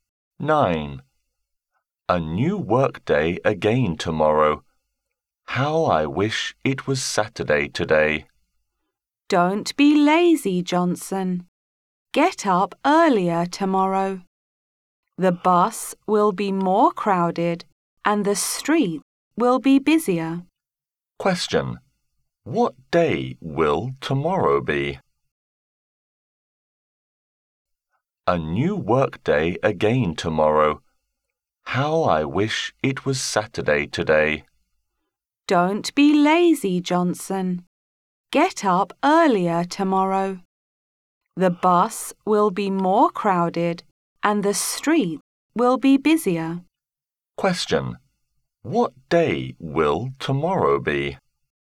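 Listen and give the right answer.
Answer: Monday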